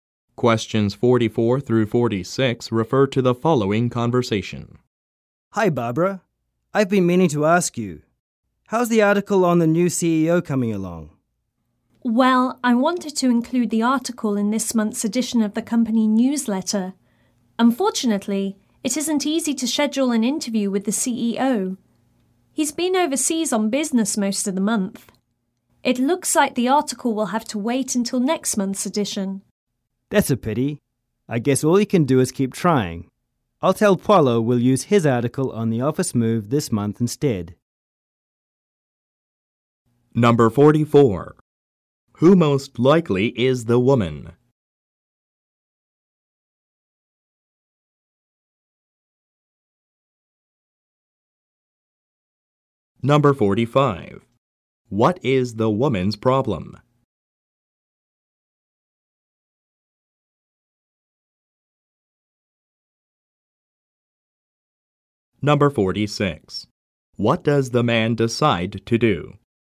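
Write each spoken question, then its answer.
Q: What is the woman's problem?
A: She can't schedule an interview with the CEO

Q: What does the man decide to do?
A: Use Paulo's article on the office move this month instead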